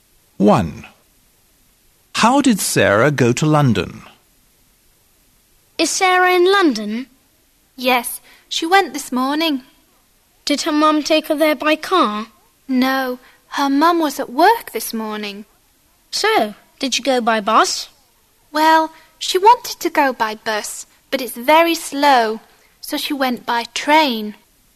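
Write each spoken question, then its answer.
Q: How did Sarah go to London?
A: by train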